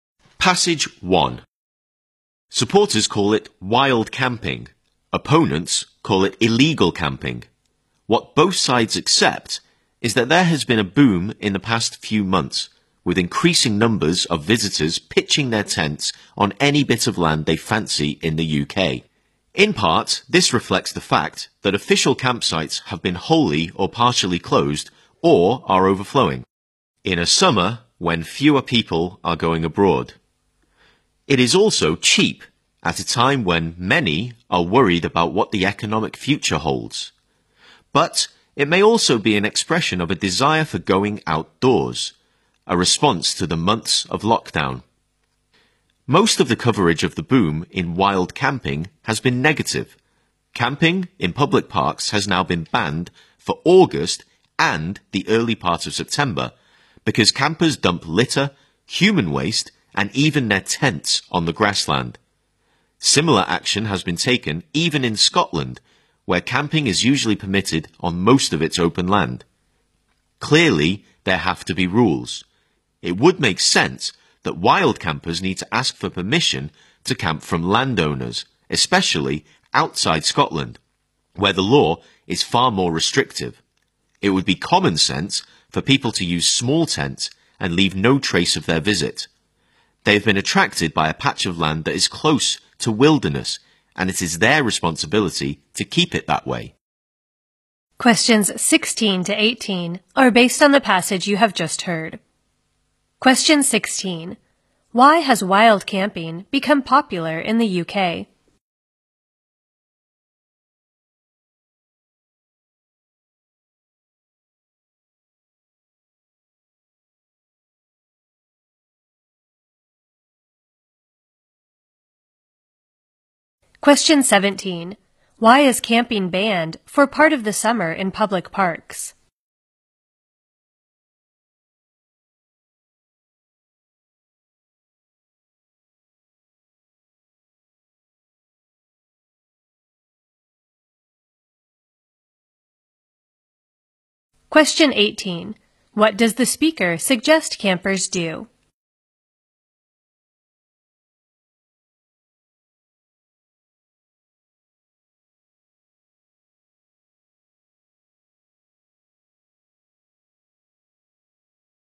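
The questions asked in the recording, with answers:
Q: Why has wild camping become popular in the UK?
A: Official campsites are closed or full, it is cheap, and people want to be outdoors after lockdown

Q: Why is camping banned for part of the summer in public parks?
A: Campers dump litter, human waste and tents on the grassland

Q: What does the speaker suggest campers do?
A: Ask landowners for permission, use small tents and leave no trace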